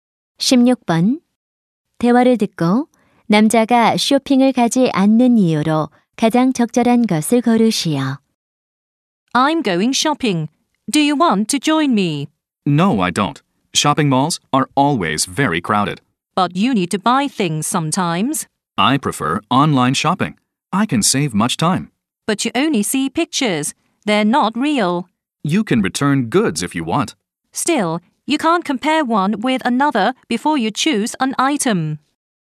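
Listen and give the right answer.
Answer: 쇼핑몰이 항상 붐벼서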